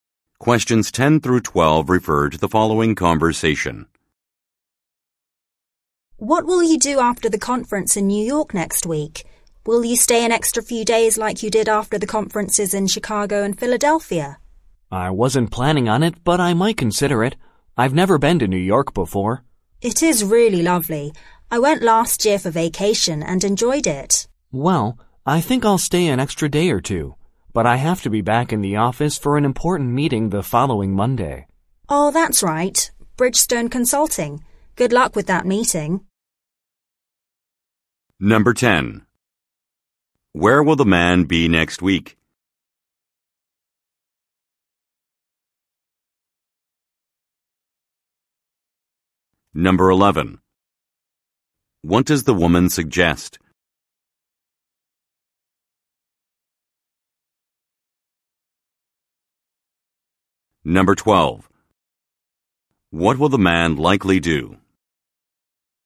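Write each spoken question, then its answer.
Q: Where will the man be next week?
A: At a conference in New York

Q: What will the man likely do?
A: Stay an extra day or two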